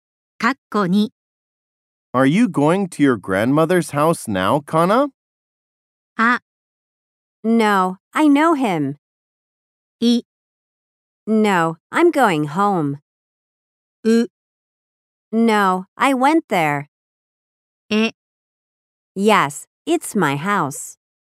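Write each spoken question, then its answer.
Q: Are you going to your grandmother's house now, Kana?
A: い: No, I'm going home.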